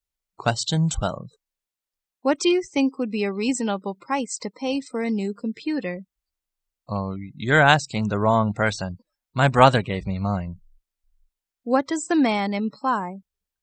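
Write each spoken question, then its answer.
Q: What does the man imply?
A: He doesn't know what a computer costs; his brother gave him his.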